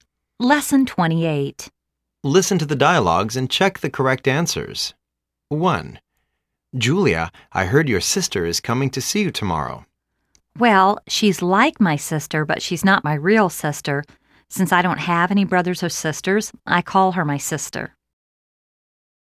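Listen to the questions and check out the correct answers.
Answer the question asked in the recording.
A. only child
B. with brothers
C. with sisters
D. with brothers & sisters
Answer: A. only child

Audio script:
A:Julia,I heard your sister is coming to see you tomorrowl
B:Well,she's like my sister but she's not my real sister.Since I don't have any brothers or sisters, I call her my sister.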